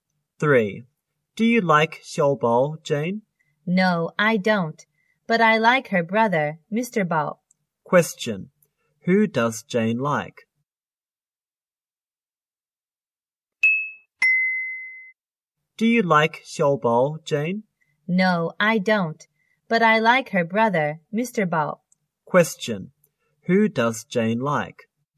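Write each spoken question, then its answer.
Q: Who does Jane like?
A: Mr. Bao, Xiao Bao's brother.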